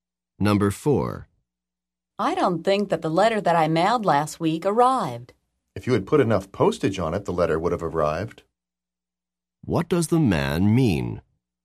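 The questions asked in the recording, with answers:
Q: What does the man mean?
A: The letter did not have enough postage.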